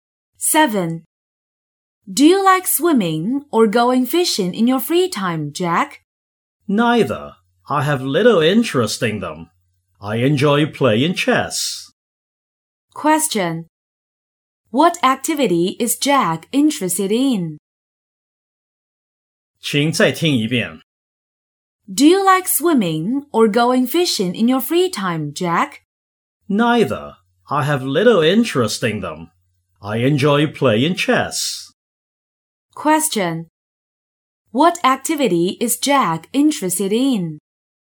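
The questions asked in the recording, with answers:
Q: What activity is Jack interested in?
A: Playing chess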